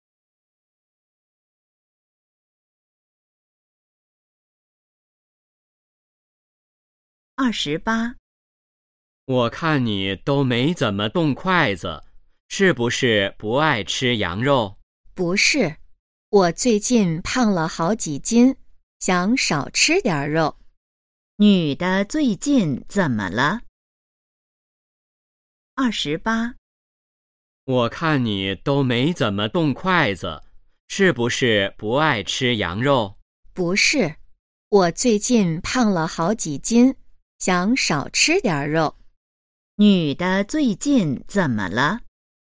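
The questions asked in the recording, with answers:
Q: 女的最近怎么了?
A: 胖了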